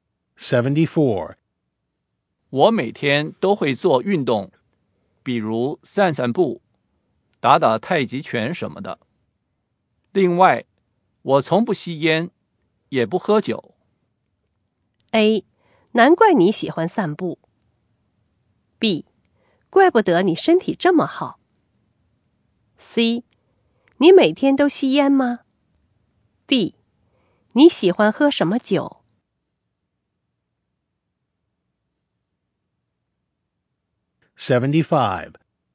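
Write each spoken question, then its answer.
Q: 我每天都会做运动,比如散散步、打打太极拳什么的。另外,我从不吸烟。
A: B: 怪不得你身体这么好。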